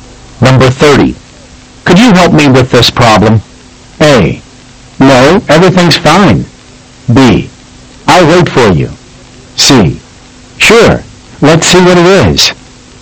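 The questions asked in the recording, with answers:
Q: Could you help me with this problem?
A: C: Sure. Let's see what it is.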